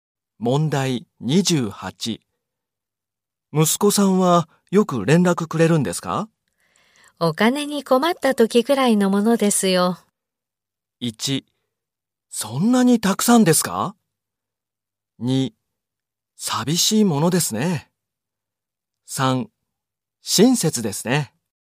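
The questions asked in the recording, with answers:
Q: お金に困った時くらいのものですよ。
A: 2: 寂しいものですね。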